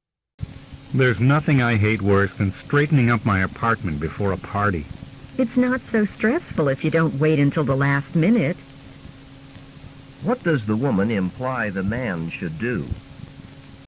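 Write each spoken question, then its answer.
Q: What does the woman imply the man should do?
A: Start cleaning earlier, not at the last minute.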